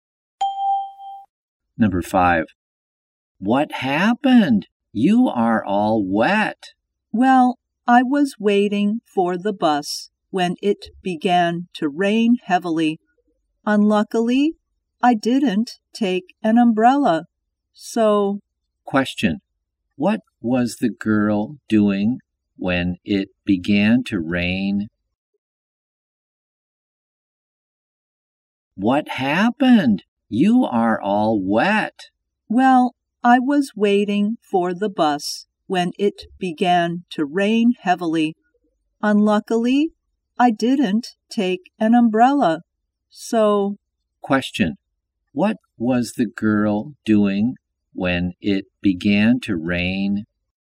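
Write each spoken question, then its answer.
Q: What was the girl doing when it began to rain?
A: Waiting for the bus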